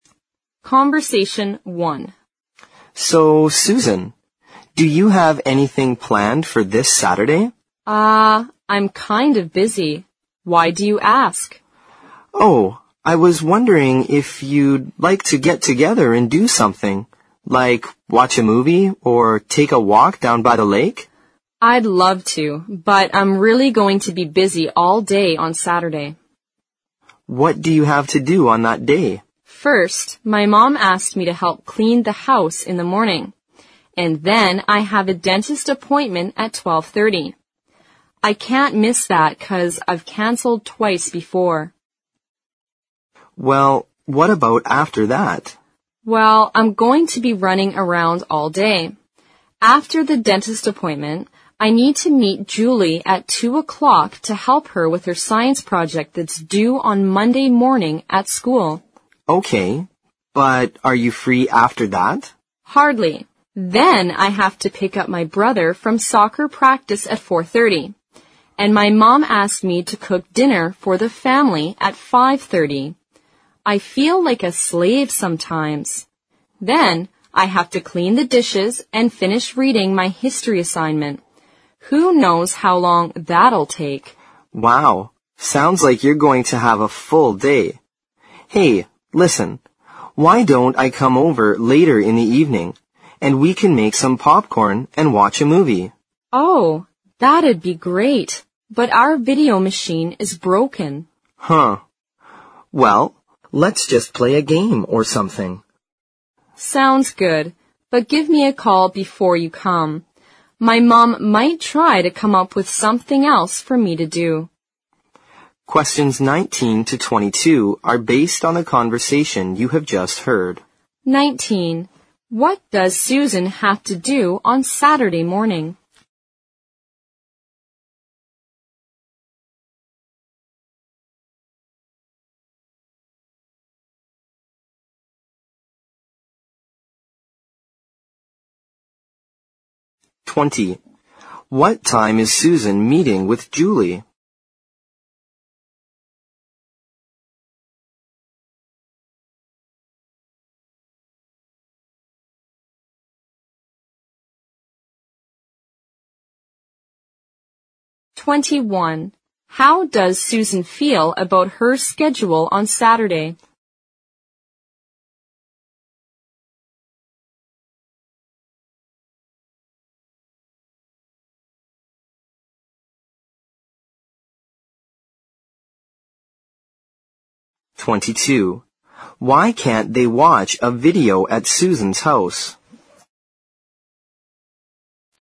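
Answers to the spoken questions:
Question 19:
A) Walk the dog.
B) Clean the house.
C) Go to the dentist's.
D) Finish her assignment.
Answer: B) Clean the house.
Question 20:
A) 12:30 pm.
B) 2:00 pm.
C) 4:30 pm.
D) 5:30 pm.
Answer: B) 2:00 pm.
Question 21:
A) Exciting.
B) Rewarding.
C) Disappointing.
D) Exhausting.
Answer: D) Exhausting.
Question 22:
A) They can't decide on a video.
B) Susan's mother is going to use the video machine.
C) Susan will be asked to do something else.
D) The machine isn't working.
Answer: D) The machine isn't working.

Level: 新编四级听力练习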